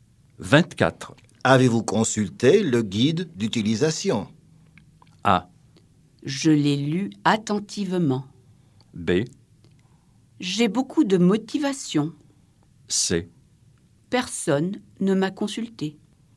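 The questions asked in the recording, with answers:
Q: Avez-vous consulté le guide d'utilisation?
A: A: Je l'ai lu attentivement.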